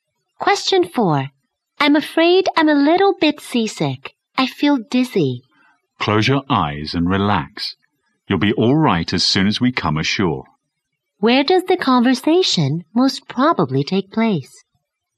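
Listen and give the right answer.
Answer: On a ship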